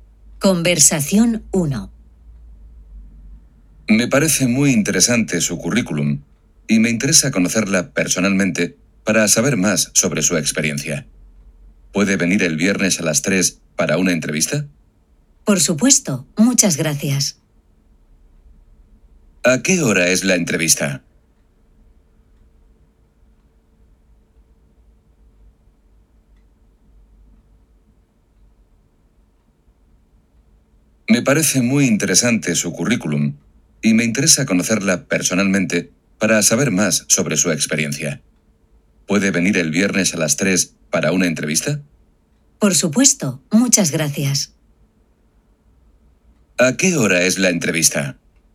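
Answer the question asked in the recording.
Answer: A las 3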